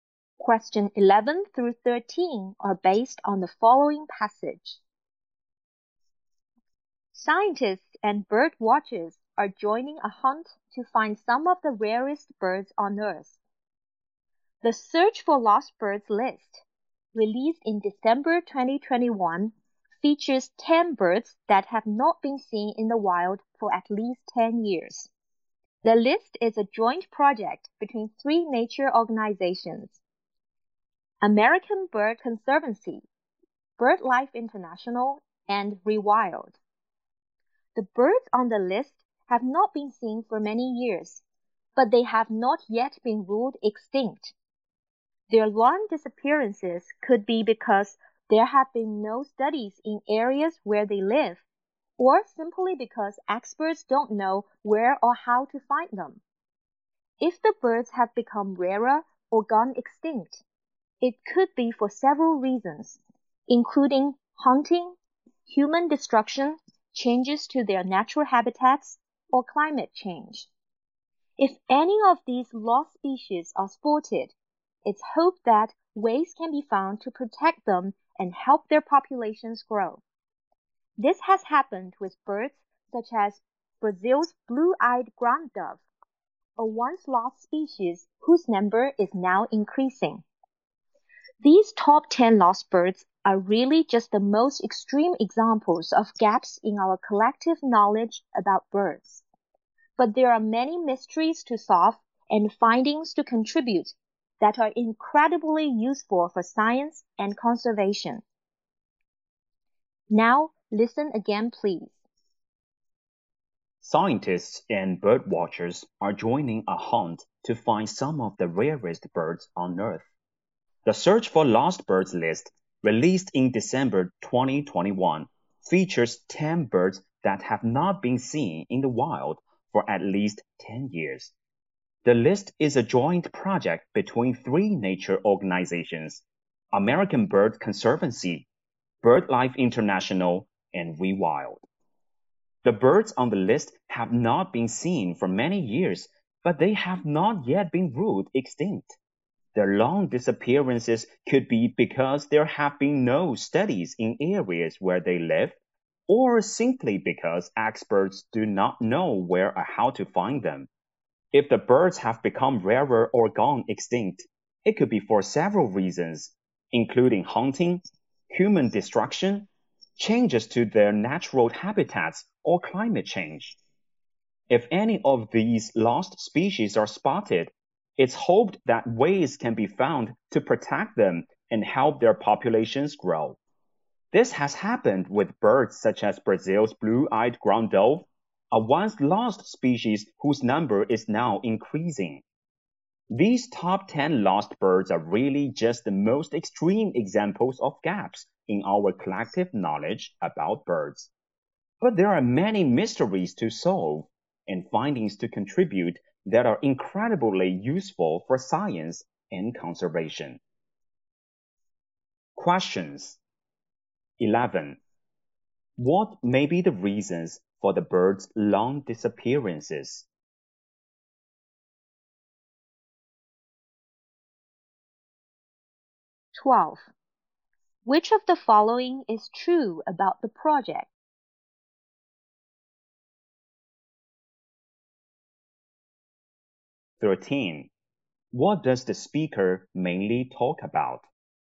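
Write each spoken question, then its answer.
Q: What may be the reasons for the birds' long disappearances?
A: No studies where they live, or experts don't know where or how to find them

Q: What does the speaker mainly talk about?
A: A search for lost rare birds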